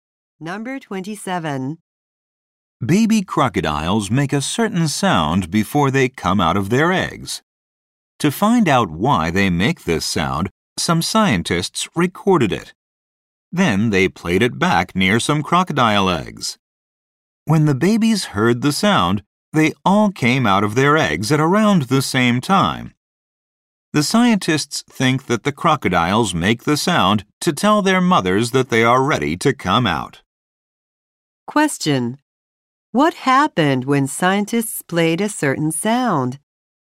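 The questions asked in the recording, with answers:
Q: What happened when scientists played a certain sound?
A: The baby crocodiles all came out of their eggs at about the same time.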